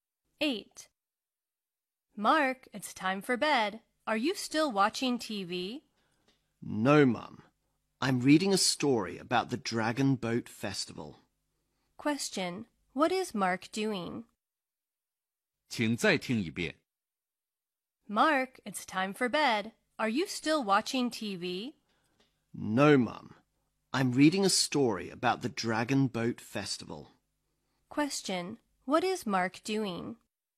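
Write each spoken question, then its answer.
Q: What is Mark doing?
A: Reading a story about the Dragon Boat Festival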